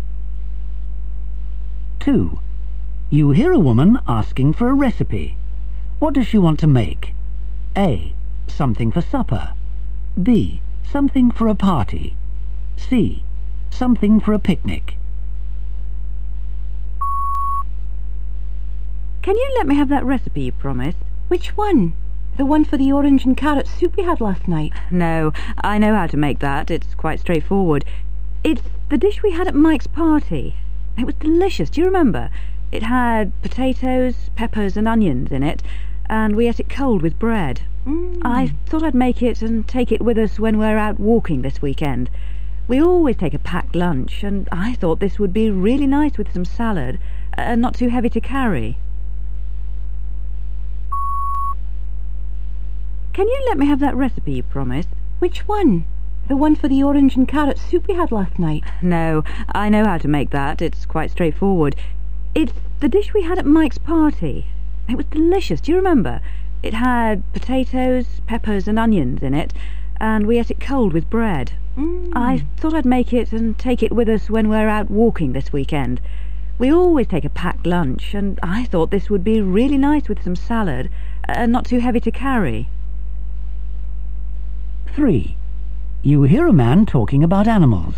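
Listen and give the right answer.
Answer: C: Something for a picnic.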